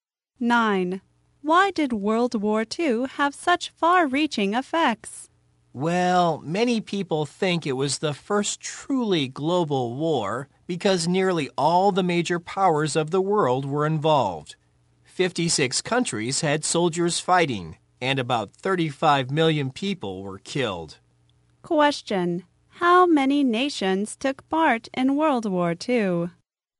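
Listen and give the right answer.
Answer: 56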